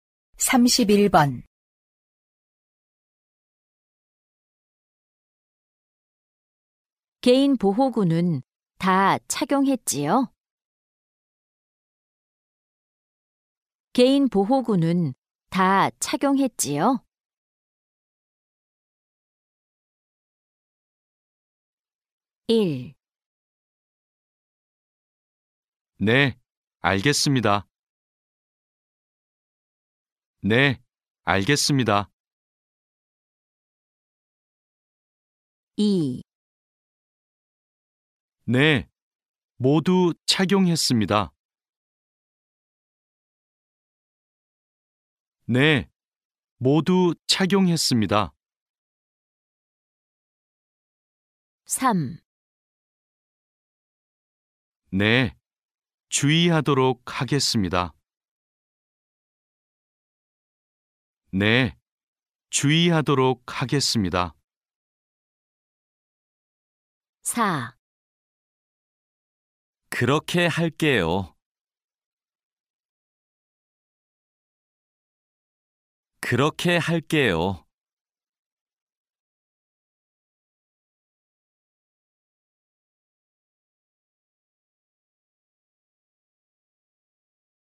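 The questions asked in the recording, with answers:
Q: 개인 보호구는 다 착용했지요?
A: 2: 네, 모두 착용했습니다.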